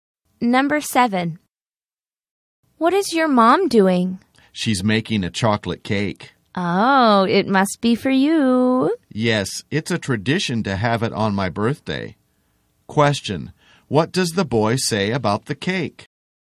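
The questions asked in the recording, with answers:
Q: What does the boy say about the cake?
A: It's a tradition to have it on his birthday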